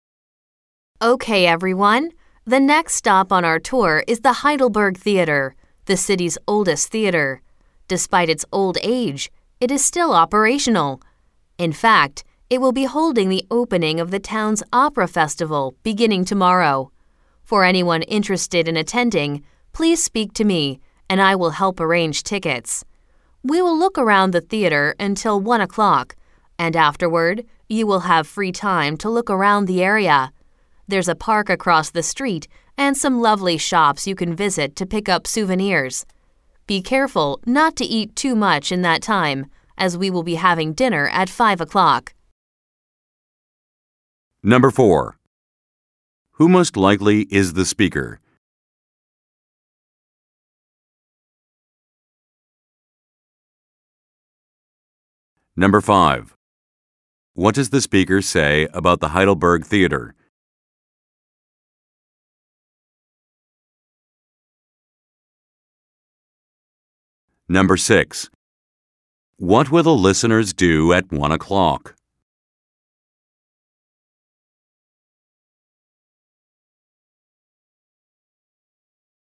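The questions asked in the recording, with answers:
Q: Who most likely is the speaker?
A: A tour guide

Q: What will the listeners do at 1 o'clock?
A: Have free time to look around the area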